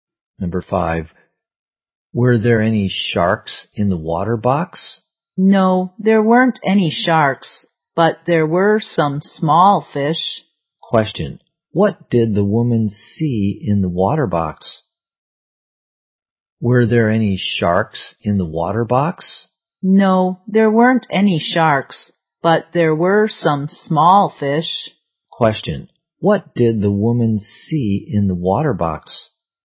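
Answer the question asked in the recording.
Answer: Some small fish.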